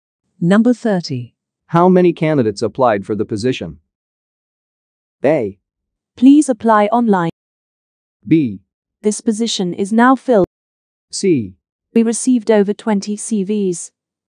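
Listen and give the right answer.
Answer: C: We received over 20 CVs.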